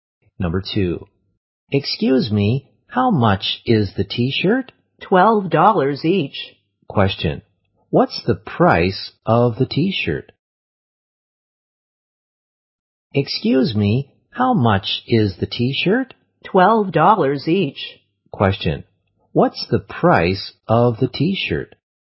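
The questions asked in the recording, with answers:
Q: What's the price of the t-shirt?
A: $12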